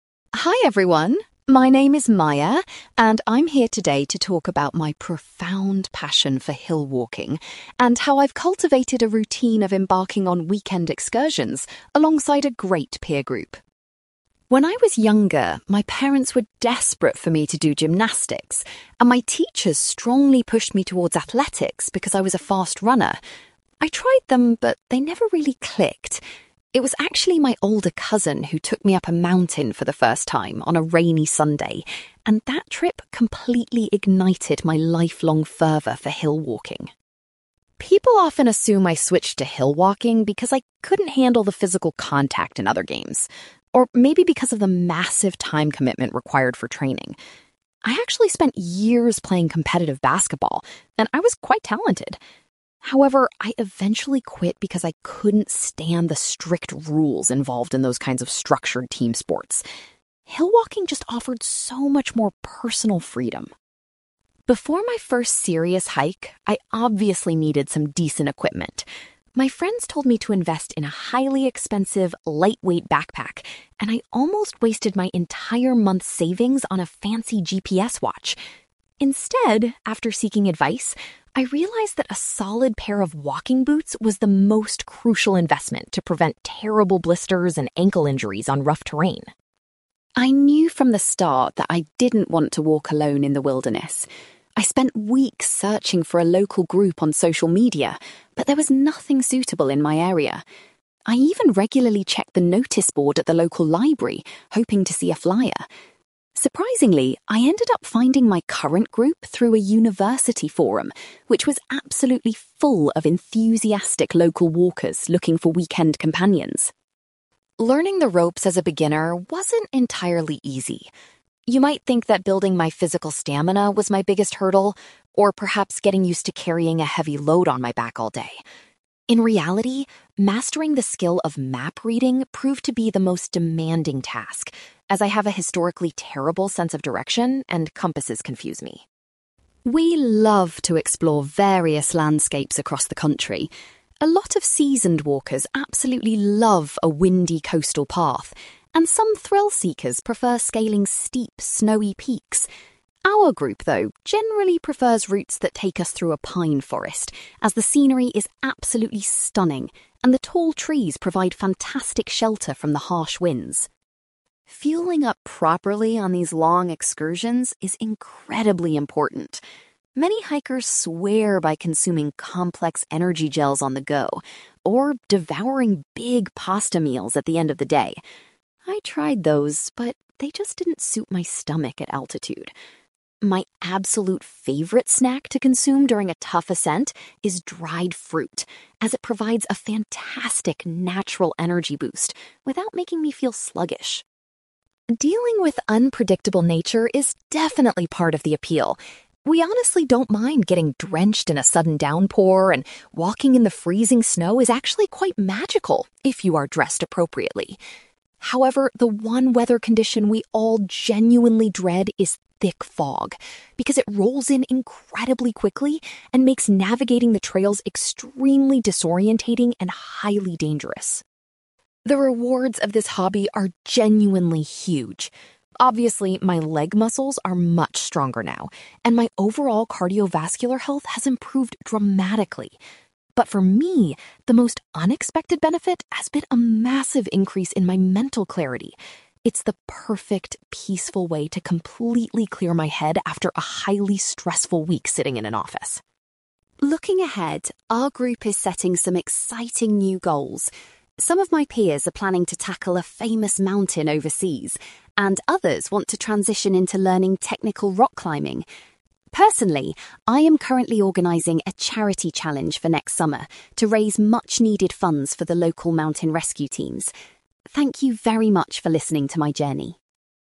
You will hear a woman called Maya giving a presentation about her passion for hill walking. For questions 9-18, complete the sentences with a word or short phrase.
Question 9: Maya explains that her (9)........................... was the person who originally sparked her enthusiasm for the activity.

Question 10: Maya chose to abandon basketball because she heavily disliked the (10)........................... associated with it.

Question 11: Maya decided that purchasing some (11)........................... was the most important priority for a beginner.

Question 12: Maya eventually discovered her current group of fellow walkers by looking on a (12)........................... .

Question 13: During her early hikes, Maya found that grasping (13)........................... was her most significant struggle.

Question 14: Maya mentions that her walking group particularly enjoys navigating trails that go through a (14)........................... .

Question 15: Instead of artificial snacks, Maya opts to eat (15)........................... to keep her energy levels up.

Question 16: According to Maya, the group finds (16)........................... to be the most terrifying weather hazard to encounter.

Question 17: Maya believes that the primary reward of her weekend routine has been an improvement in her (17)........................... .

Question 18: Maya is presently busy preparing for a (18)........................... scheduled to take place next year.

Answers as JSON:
{"9": "older cousin", "10": "strict rules", "11": "walking boots", "12": "university forum", "13": "map reading", "14": "pine forest", "15": "dried fruit", "16": "thick fog", "17": "mental clarity", "18": "charity challenge"}

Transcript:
Maya: Hi everyone, my name is Maya, and I'm here today to talk about my profound passion for hill walking, and how I've cultivated a routine of embarking on weekend excursions alongside a great peer group.
When I was younger, my parents were desperate for me to do gymnastics, and my teachers strongly pushed me towards athletics because I was a fast runner. I tried them, but they never really clicked. It was actually my older cousin who took me up a mountain for the first time on a rainy Sunday, and that trip completely ignited my lifelong fervour for hill walking.
People often assume I switched to hill walking because I couldn't handle the physical contact in other games, or maybe because of the massive time commitment required for training. I actually spent years playing competitive basketball and I was quite talented. However, I eventually quit because I couldn't stand the strict rules involved in those kinds of structured team sports. Hill walking just offered so much more personal freedom.
Before my first serious hike, I obviously needed some decent equipment. My friends told me to invest in a highly expensive, lightweight backpack, and I almost wasted my entire month's savings on a fancy GPS watch. Instead, after seeking advice, I realised that a solid pair of walking boots was the most crucial investment to prevent terrible blisters and ankle injuries on rough terrain.
I knew from the start that I didn't want to walk alone in the wilderness. I spent weeks searching for a local group on social media, but there was nothing suitable in my area. I even regularly checked the notice board at the local library hoping to see a flyer. Surprisingly, I ended up finding my current group through a university forum, which was absolutely full of enthusiastic local walkers looking for weekend companions.
Learning the ropes as a beginner wasn't entirely easy. You might think that building my physical stamina was my biggest hurdle, or perhaps getting used to carrying a heavy load on my back all day. In reality, mastering the skill of map reading proved to be the most demanding task, as I have a historically terrible sense of direction and compasses confused me.
We love to explore various landscapes across the country. A lot of seasoned walkers absolutely love a windy coastal path, and some thrill-seekers prefer scaling steep, snowy peaks. Our group, though, generally prefers routes that take us through a pine forest, as the scenery is absolutely stunning and the tall trees provide fantastic shelter from the harsh winds.
Fueling up properly on these long excursions is incredibly important. Many hikers swear by consuming complex energy gels on the go, or devouring big pasta meals at the end of the day. I tried those, but they just didn't suit my stomach at altitude. My absolute favourite snack to consume during a tough ascent is dried fruit, as it provides a fantastic, natural energy boost without making me feel sluggish.
Dealing with unpredictable nature is definitely part of the appeal. We honestly don't mind getting drenched in a sudden downpour, and walking in the freezing snow is actually quite magical if you are dressed appropriately. However, the one weather condition we all genuinely dread is thick fog, because it rolls in incredibly quickly and makes navigating the trails extremely disorientating and highly dangerous.
The rewards of this hobby are genuinely huge. Obviously, my leg muscles are much stronger now, and my overall cardiovascular health has improved dramatically. But for me, the most unexpected benefit has been a massive increase in my mental clarity. It's the perfect, peaceful way to completely clear my head after a highly stressful week sitting in an office.
Looking ahead, our group is setting some exciting new goals. Some of my peers are planning to tackle a famous mountain overseas, and others want to transition into learning technical rock climbing. Personally, I am currently organizing a charity challenge for next summer to raise much-needed funds for the local mountain rescue teams. Thank you very much for listening to my journey!

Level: B2